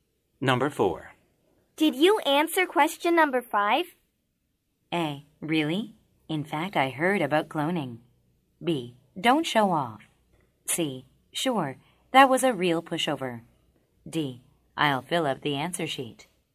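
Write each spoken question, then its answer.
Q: Did you answer question number 5?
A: C: Sure, that was a real pushover.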